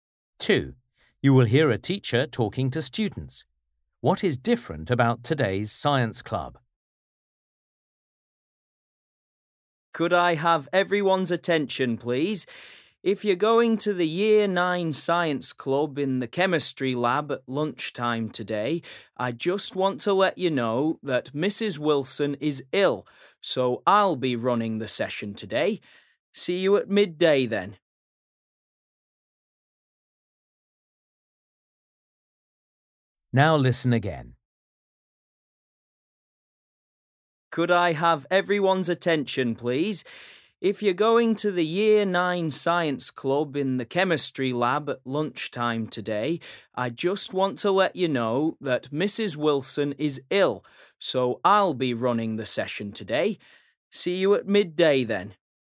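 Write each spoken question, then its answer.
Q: What is different about today's science club?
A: a different teacher is running it because Mrs. Wilson is ill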